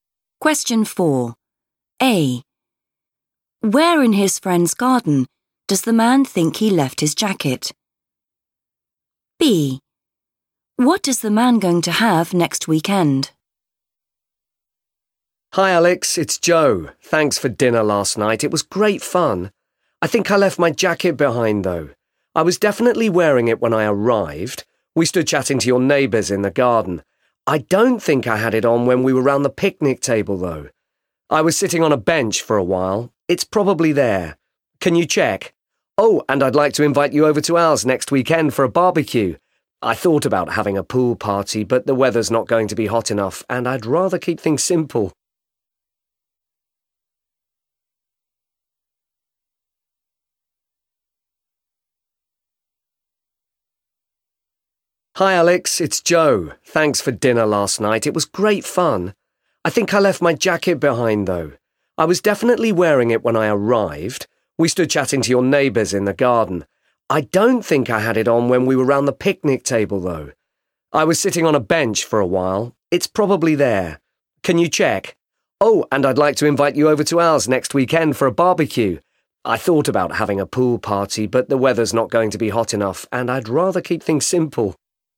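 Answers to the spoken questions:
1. on a bench
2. a barbecue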